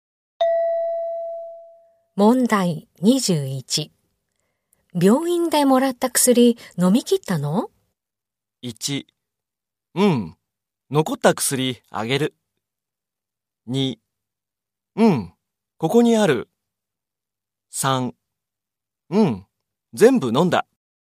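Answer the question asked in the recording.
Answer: 3: うん、全部飲んだ。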